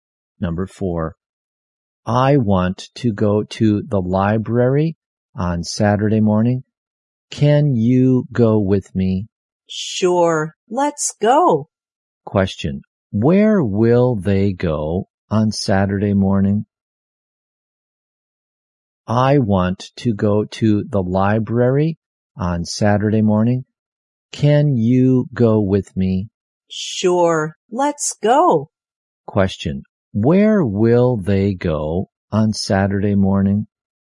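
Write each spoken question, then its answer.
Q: where will they go on Saturday morning?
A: To the library.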